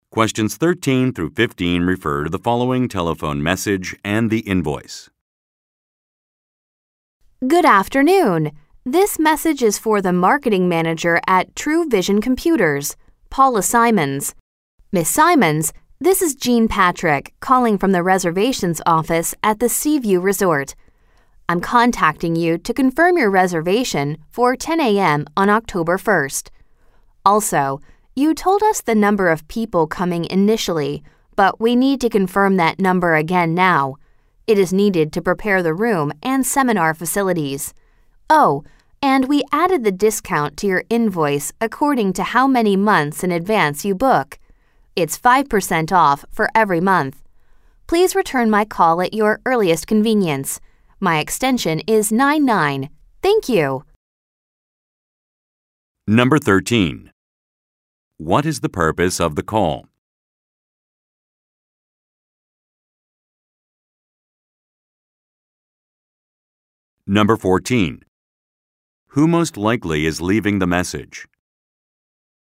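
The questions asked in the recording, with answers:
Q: What is the purpose of the call?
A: To confirm a reservation

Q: Who most likely is leaving the message?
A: A reservations office employee at the Seaview Resort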